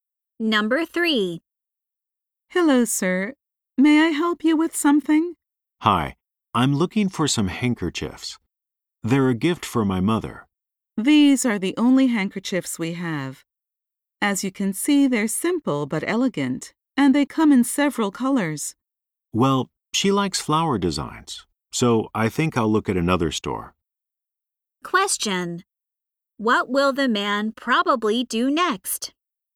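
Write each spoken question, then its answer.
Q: What will the man probably do next?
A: Look for handkerchiefs at another store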